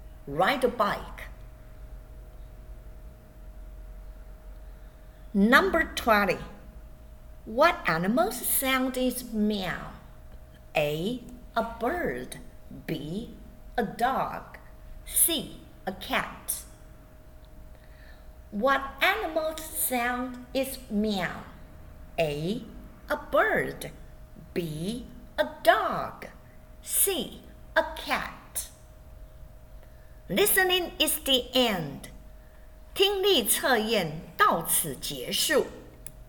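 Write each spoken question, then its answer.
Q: What animal's sound is meow?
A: C: A cat.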